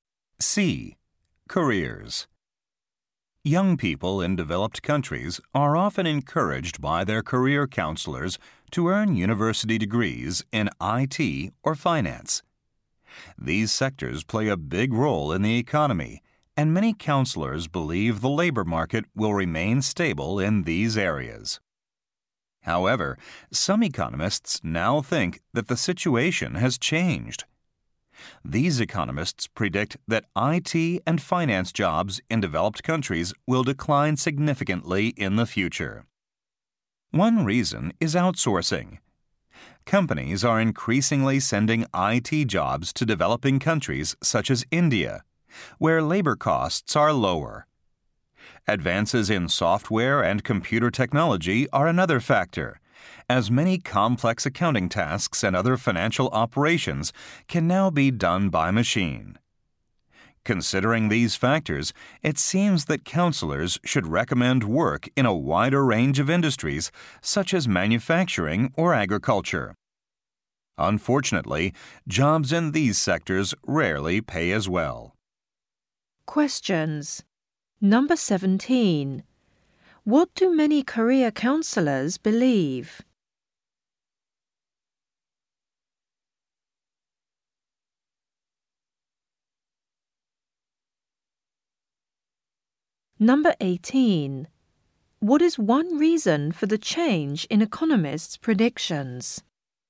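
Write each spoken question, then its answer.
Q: What do many career counselors believe?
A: IT and finance jobs will remain stable

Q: What is one reason for the change in economists' predictions?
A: Outsourcing of IT jobs to developing countries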